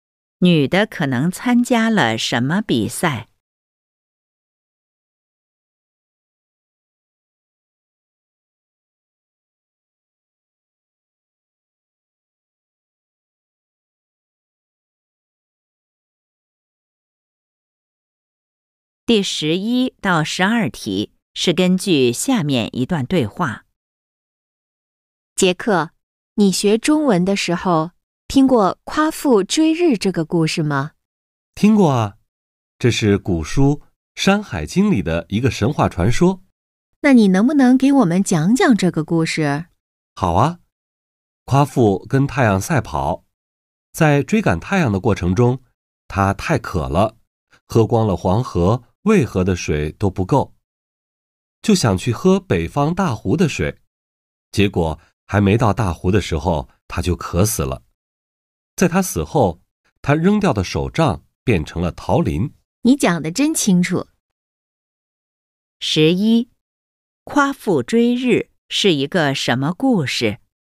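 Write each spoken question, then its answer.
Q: 夸父追日是一个什么故事?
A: 神话传说

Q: 夸父是怎么死的?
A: 渴死的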